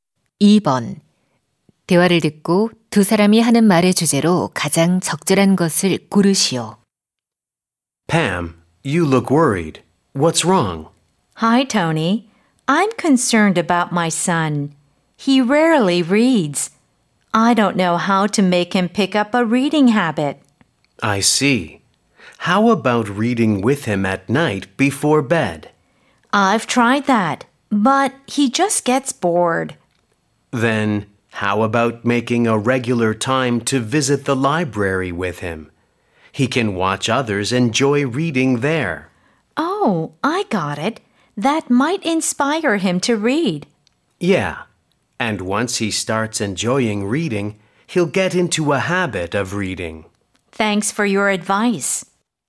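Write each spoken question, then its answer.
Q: 대화를 듣고 두 사람이 하는 말의 주제로 가장 적절한 것을 고르시오.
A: 아이의 독서 습관을 기르는 방법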